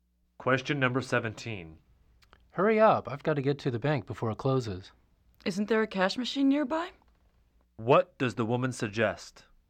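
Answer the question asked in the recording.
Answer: Using a nearby cash machine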